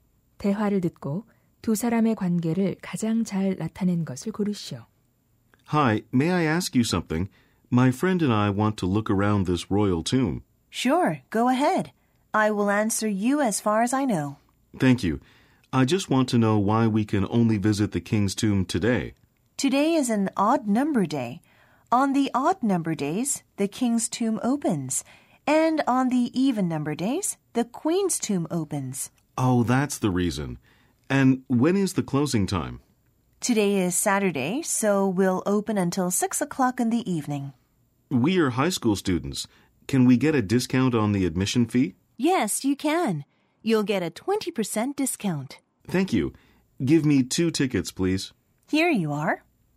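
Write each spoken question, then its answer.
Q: 대화를 듣고 두 사람의 관계를 가장 잘 나타낸 것을 고르시오.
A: 관광객 - 매표소 직원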